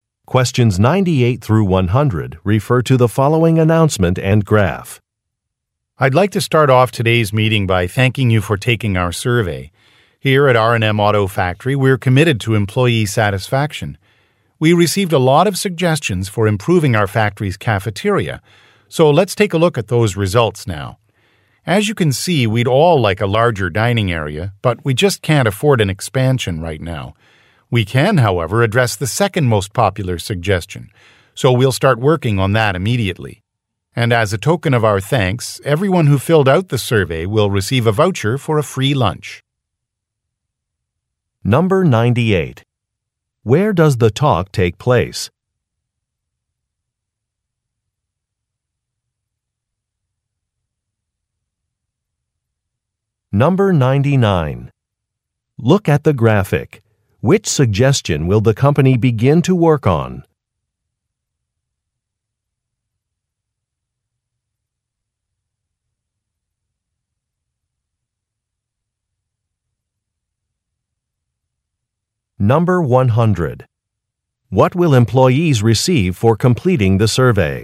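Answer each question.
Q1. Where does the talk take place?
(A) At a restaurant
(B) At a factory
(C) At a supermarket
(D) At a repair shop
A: (B) At a factory

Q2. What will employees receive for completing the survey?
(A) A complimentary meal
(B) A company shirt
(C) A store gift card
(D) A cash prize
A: (A) A complimentary meal

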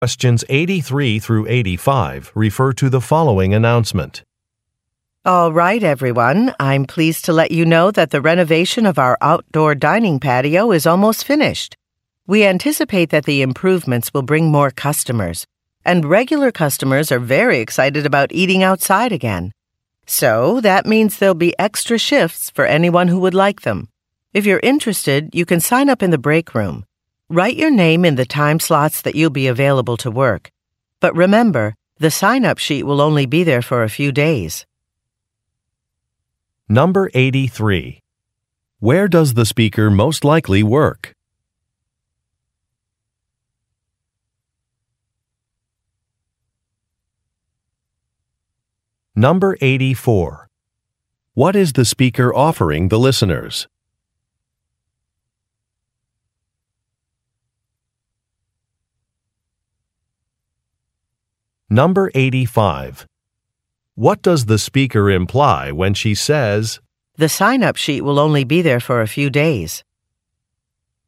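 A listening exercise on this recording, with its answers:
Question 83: Where does the speaker most likely work?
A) At a furniture store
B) At a construction company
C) At a gardening center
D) At a restaurant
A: D) At a restaurant

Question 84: What is the speaker offering the listeners?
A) Additional work shifts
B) Free beverages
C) Longer breaks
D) More vacation time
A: A) Additional work shifts

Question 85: What does the speaker imply when she says, "the sign-up sheet will only be there for a few days"?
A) She needs clarification.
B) She will follow the correct procedure.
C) Employees should act soon.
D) Employees can submit recommendations.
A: C) Employees should act soon.

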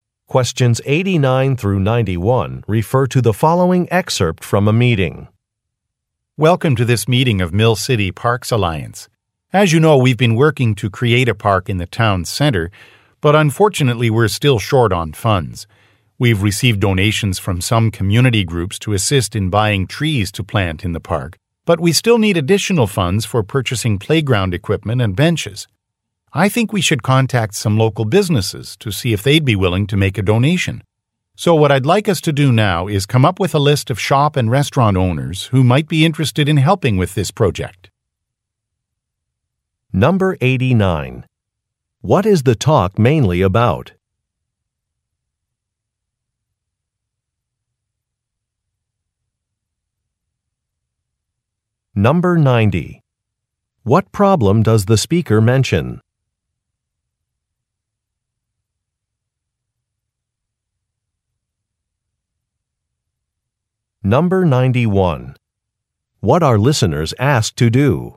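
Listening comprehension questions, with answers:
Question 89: What is the talk mainly about?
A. Attracting employers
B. Building a park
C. Planning a celebration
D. Analyzing traffic patterns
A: B. Building a park

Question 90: What problem does the speaker mention?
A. Delayed permits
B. Broken equipment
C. Scheduling conflicts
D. Lack of funds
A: D. Lack of funds

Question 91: What are listeners asked to do?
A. Conduct a survey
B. Choose a location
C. Make a list of business owners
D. Purchase some supplies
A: C. Make a list of business owners

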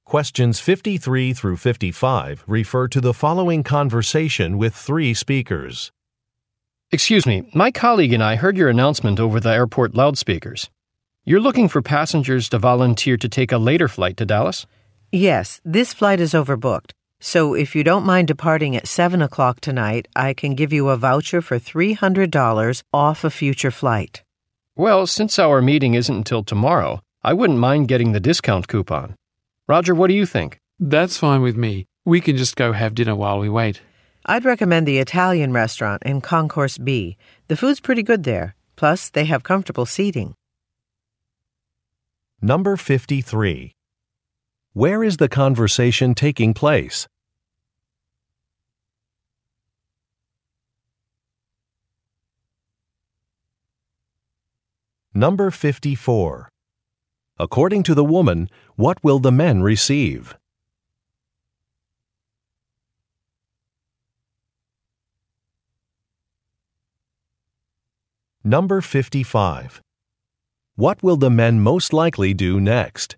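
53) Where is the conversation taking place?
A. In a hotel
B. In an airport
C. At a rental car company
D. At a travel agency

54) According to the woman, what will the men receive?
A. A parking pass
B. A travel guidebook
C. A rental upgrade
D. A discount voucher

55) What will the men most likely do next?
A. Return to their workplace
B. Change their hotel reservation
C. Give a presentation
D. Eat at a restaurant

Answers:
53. B. In an airport
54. D. A discount voucher
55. D. Eat at a restaurant

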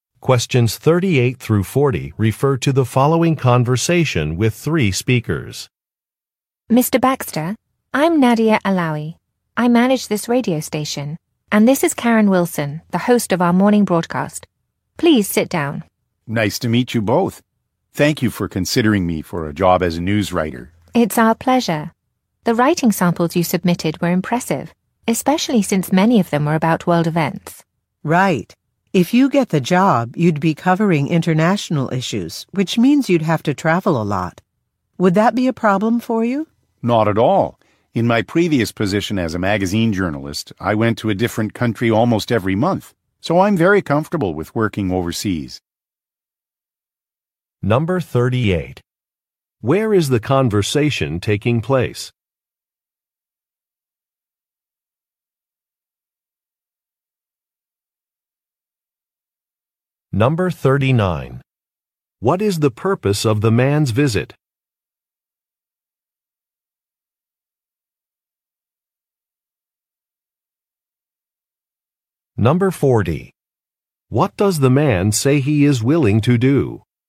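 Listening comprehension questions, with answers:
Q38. Where is the conversation taking place?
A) At a radio station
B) At a public library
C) At a publishing company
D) At an import-export firm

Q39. What is the purpose of the man's visit?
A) To propose an advertising plan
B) To make a repair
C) To interview for a job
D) To lead a training session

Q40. What does the man say he is willing to do?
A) Lower a fee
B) Upgrade some software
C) Rush an order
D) Travel internationally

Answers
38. A) At a radio station
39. C) To interview for a job
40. D) Travel internationally

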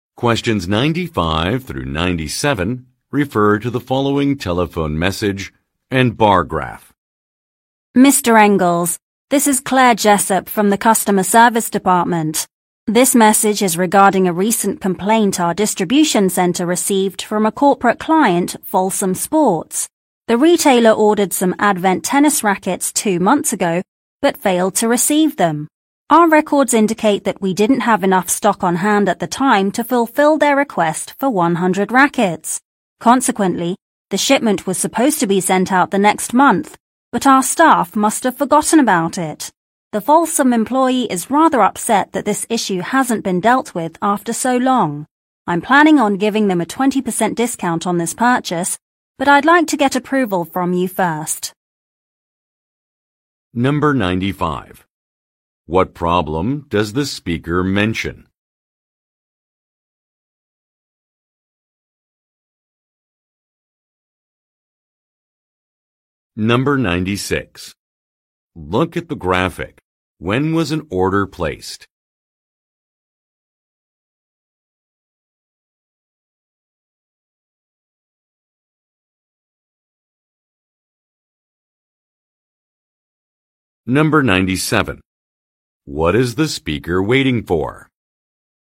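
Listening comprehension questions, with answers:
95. What problem does the speaker mention?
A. A client was overcharged.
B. A sports product must be recalled.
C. A shipment was not delivered.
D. A message was deleted.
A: C. A shipment was not delivered.

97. What is the speaker waiting for?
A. Feedback from a sales team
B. Permission to carry out a plan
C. An order number from staff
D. A payment from a customer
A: B. Permission to carry out a plan

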